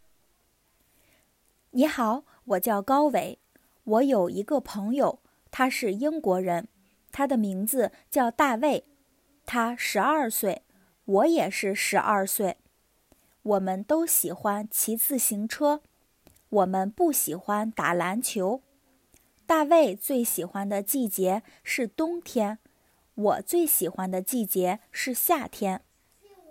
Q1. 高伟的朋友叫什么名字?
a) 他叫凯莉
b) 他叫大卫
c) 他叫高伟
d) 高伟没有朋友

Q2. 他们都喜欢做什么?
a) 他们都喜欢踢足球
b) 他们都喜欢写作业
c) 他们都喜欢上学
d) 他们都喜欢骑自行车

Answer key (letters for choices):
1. b
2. d

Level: beginner's